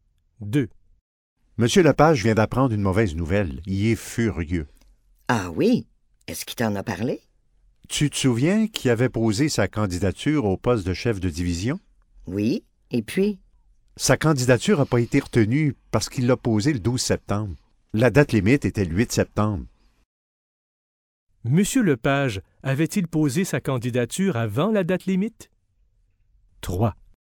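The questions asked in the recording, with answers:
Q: Monsieur Lepage, avait-il posé sa candidature avant la date limite?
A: Non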